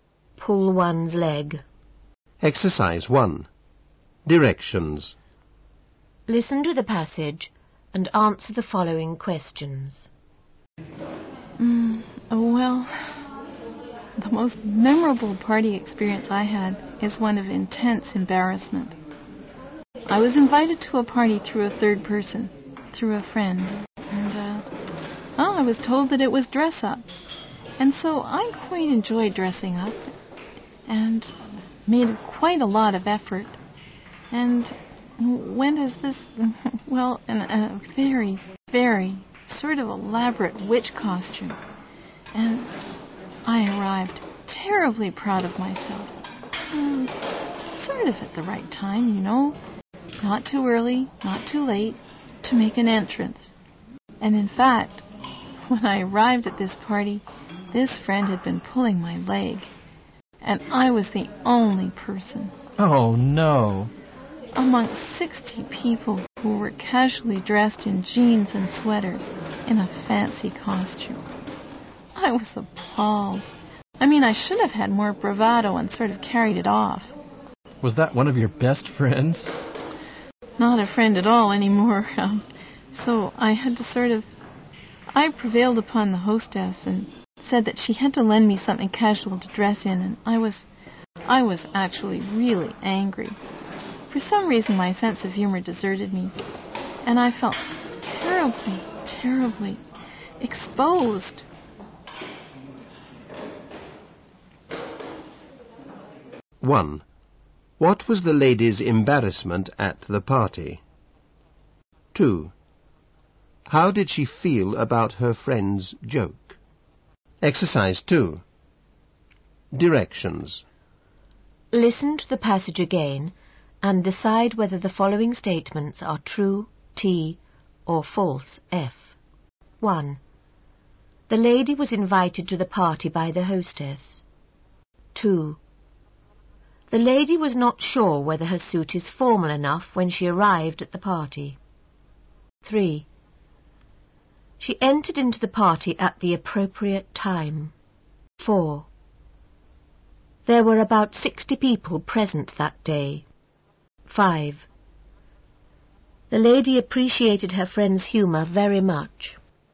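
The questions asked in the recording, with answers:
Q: What was the lady's embarrassment at the party?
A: She was the only person in fancy costume among 60 casually dressed people

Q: How did she feel about her friend's joke?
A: She was really angry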